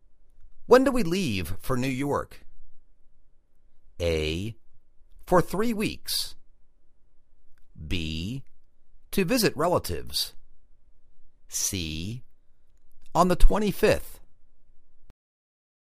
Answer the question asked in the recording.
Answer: On the 25th